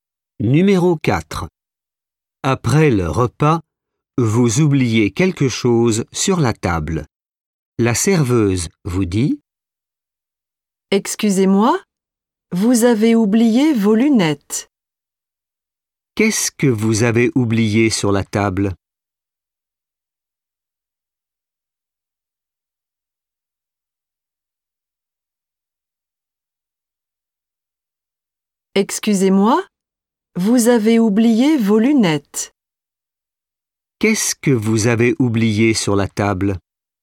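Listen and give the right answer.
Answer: Vos lunettes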